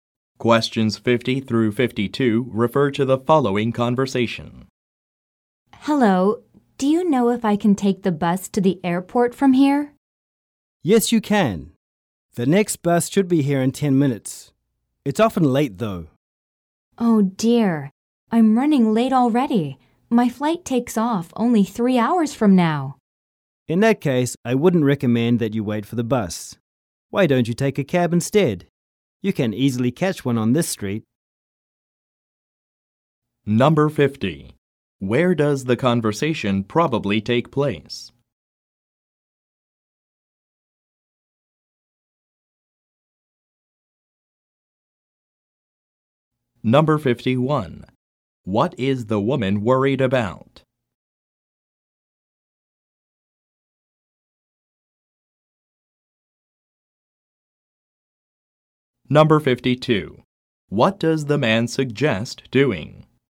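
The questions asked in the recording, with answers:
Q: Where does the conversation probably take place?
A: At a bus stop

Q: What does the man suggest doing?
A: Taking a taxi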